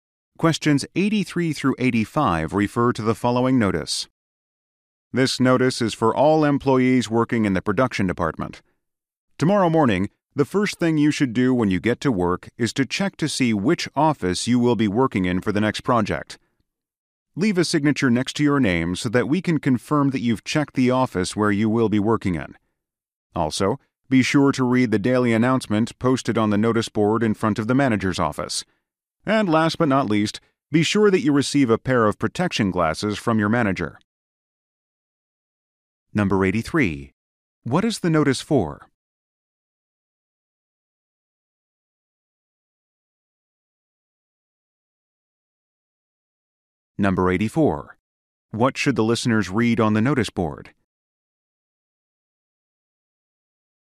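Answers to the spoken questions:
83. To give production department employees instructions for tomorrow
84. The daily announcement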